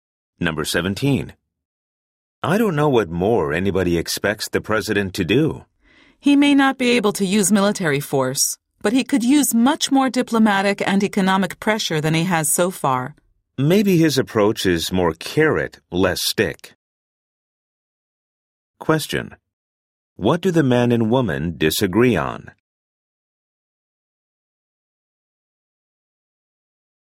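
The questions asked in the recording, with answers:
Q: What do the man and woman disagree on?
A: How much pressure the president should use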